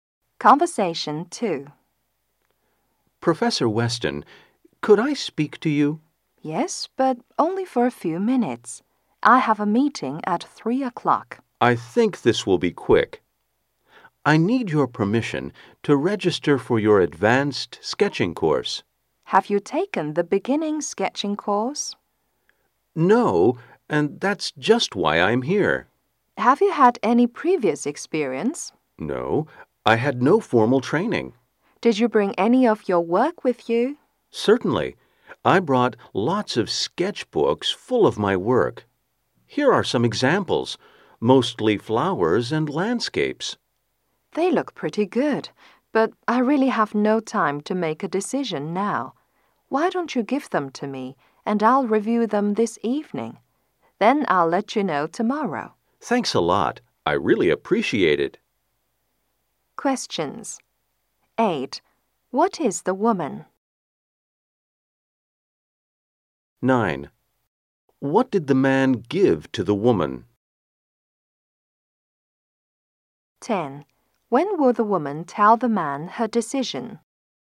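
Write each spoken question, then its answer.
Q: What is the woman?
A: A professor

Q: What did the man give to the woman?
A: Sketchbooks of his work

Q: When will the woman tell the man her decision?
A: Tomorrow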